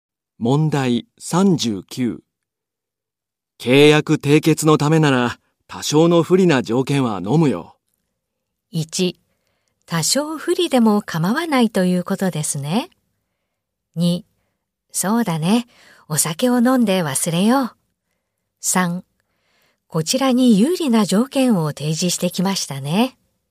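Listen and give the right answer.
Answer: 1: 多少不利でも構わないということですね。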